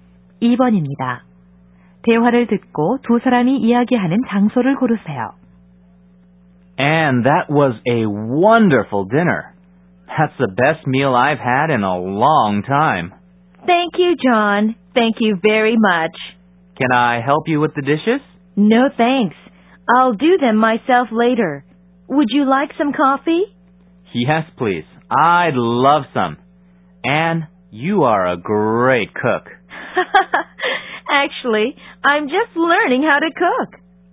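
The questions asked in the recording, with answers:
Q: 대화를 듣고 두 사람이 이야기하는 장소를 고르세요.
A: 여자(Anne)의 집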